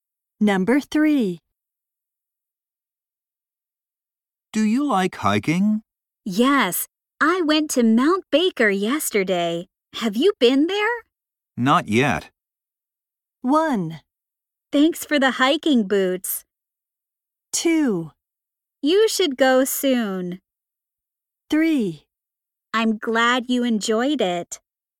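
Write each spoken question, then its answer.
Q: Not yet.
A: 2: You should go soon.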